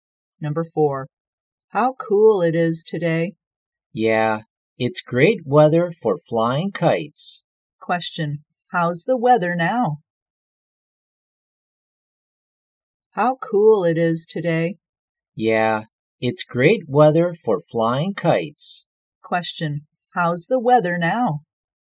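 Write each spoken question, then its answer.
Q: How's the weather now?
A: Cool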